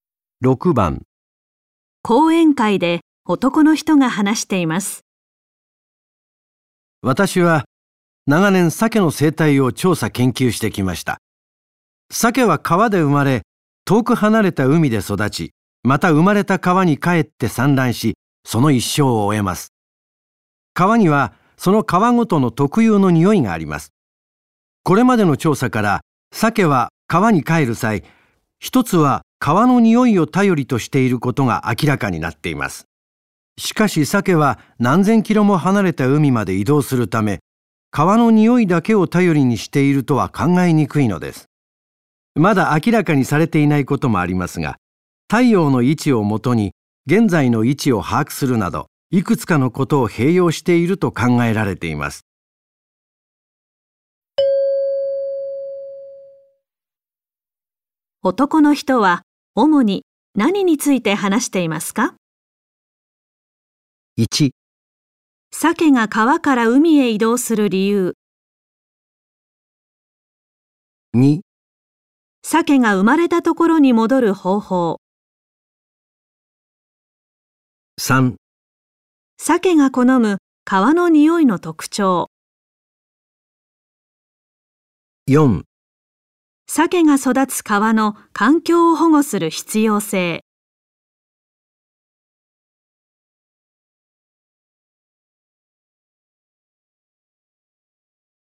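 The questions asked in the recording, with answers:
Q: 男の人は主に何について話していますか?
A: 2: 鮭が生まれたところに戻る方法。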